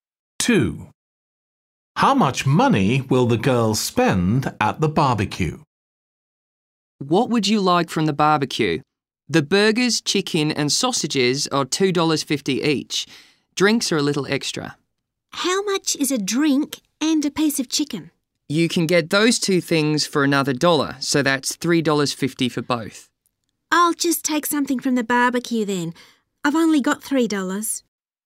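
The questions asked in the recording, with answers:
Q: How much money will the girl spend at the barbecue?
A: $2.50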